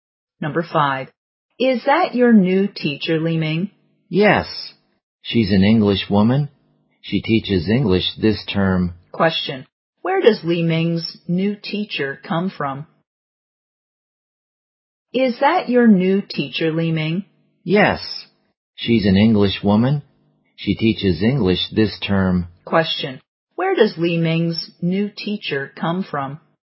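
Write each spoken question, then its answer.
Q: Question. Where does Li Ming's new teacher come from?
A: England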